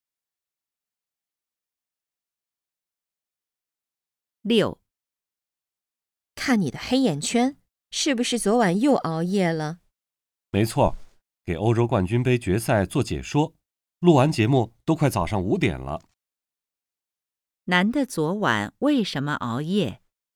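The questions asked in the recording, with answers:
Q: 男的昨晚为什么熬夜?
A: 给欧洲冠军杯决赛做解说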